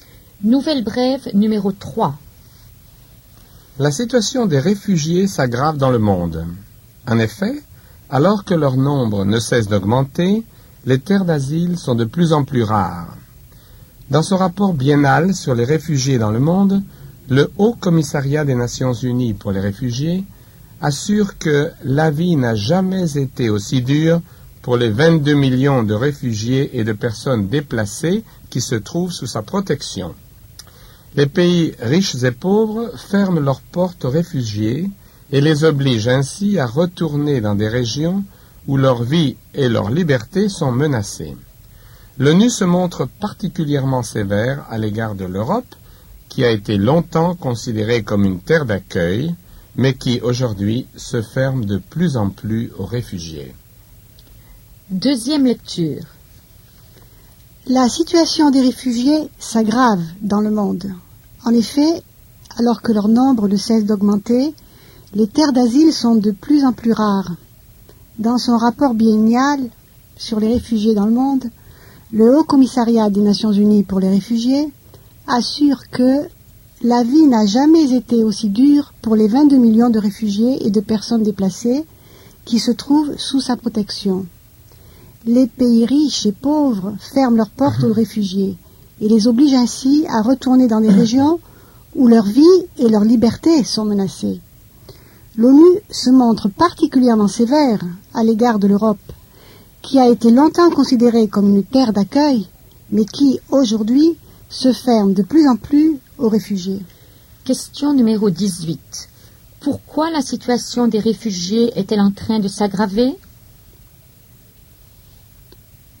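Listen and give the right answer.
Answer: Leur nombre augmente alors que les terres d'asile se font de plus en plus rares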